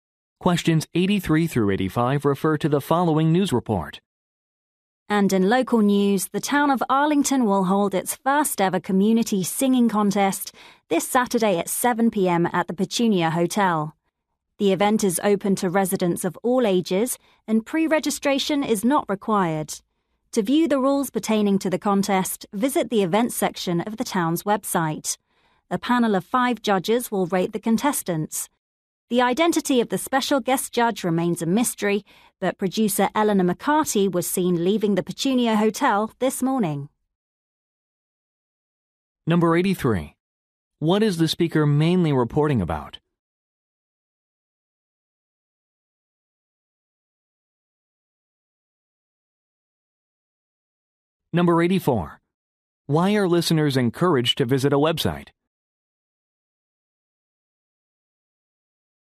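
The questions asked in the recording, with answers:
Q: What is the speaker mainly reporting about?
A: A community singing contest

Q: Why are listeners encouraged to visit a website?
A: To view the contest rules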